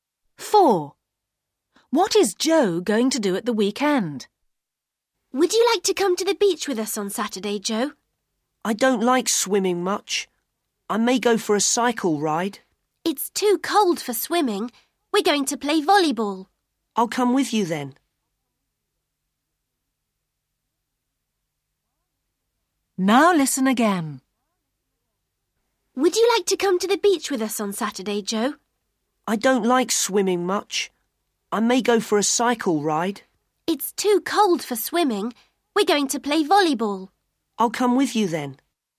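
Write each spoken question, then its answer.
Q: What is Joe going to do at the weekend?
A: Play volleyball at the beach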